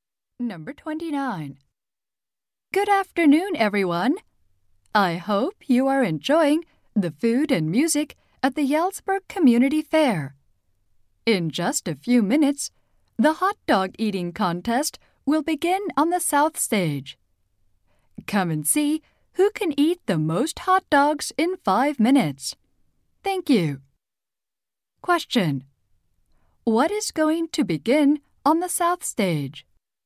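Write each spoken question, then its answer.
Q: Question. What is going to begin on the south stage?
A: A hot dog eating contest.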